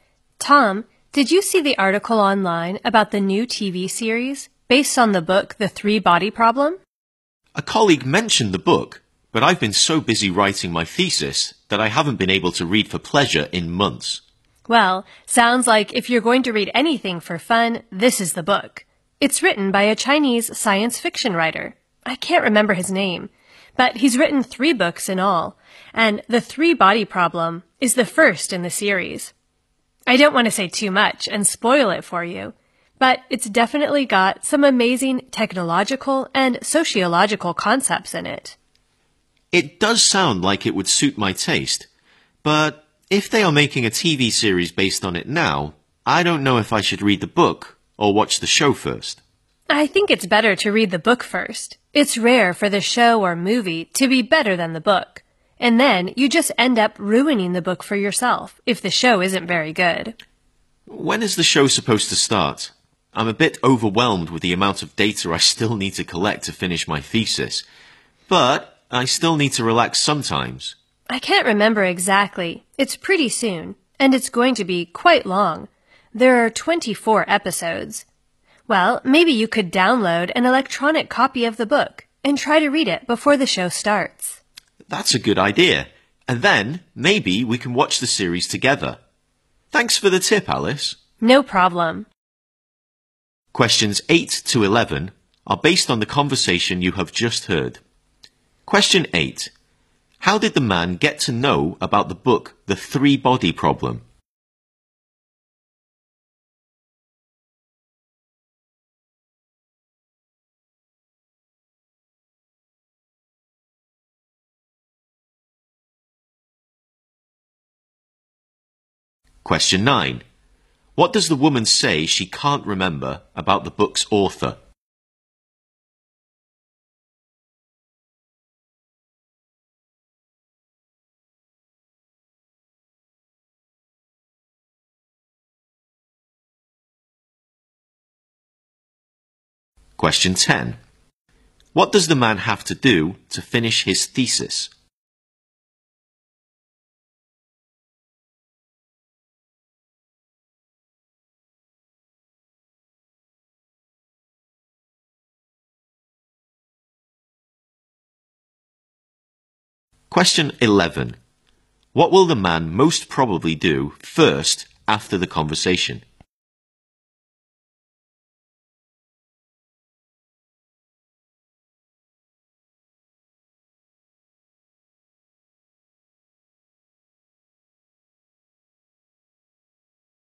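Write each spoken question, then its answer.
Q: How did the man get to know about the book The Three Body Problem?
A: A colleague mentioned it

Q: What does the woman say she can't remember about the book's author?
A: His name

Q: What does the man have to do to finish his thesis?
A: Collect a lot more data

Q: What will the man most probably do first after the conversation?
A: Download an electronic copy of the book and read it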